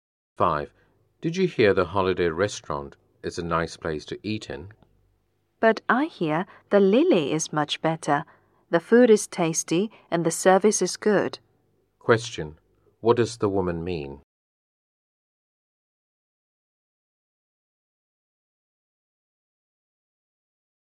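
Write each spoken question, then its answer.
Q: What does the woman mean?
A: The Lily is a better restaurant than the Holiday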